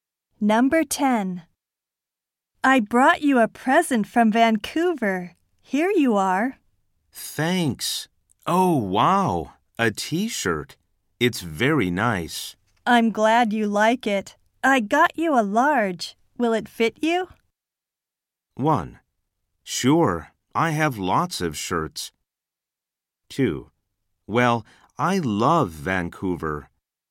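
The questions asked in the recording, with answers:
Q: Will it fit you?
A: 3: Yes. That's my size.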